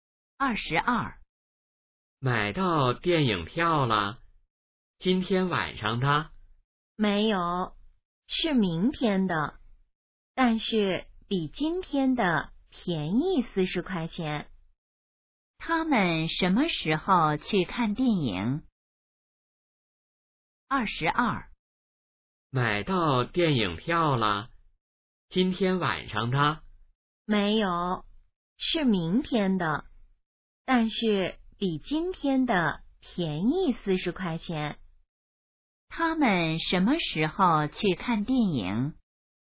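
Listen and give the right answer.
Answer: 明天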